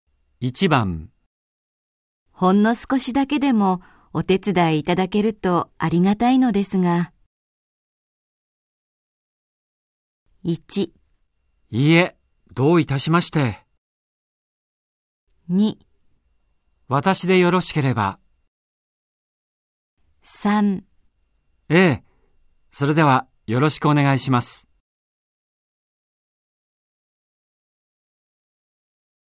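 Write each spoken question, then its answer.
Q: ほんの少しだけでもお手伝いいただけるとありがたいのですが。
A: 2: 私でよろしければ。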